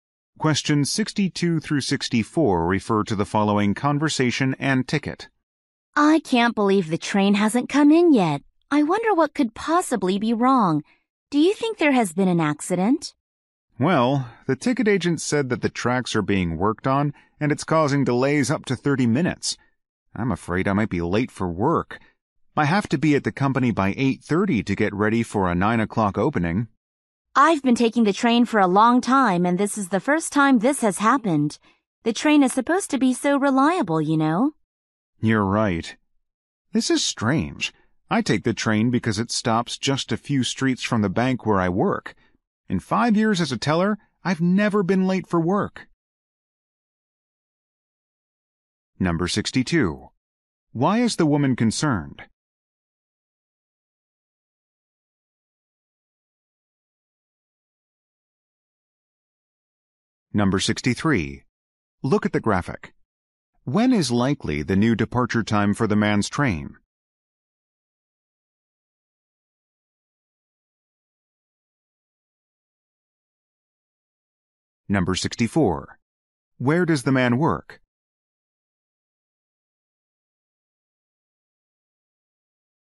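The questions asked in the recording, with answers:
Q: Why is the woman concerned?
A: She might be late for work

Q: Where does the man work?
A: At a bank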